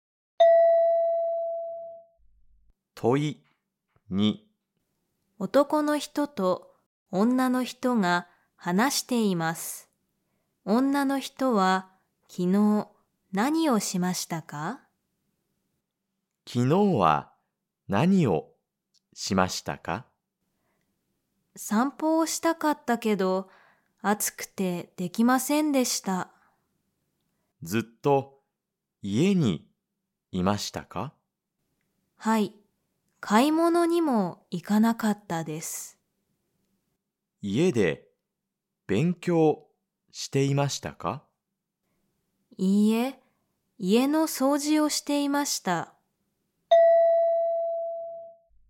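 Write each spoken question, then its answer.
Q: 女の人は昨日何をしましたか?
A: 家の掃除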